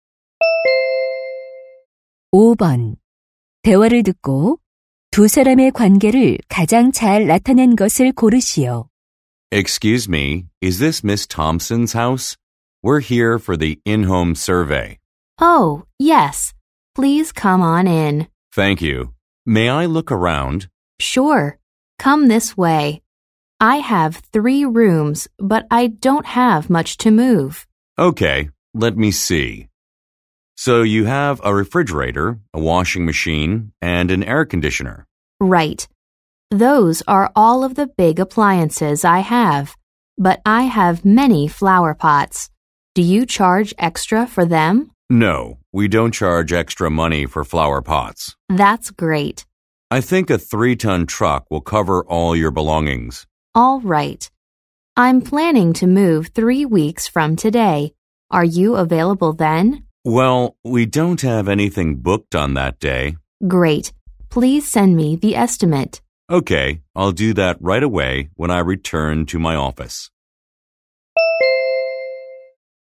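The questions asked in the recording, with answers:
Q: 대화를 듣고 두 사람의 관계를 가장 잘 나타낸 것을 고르시오.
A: 이사 의뢰인 - 이삿짐 센터 직원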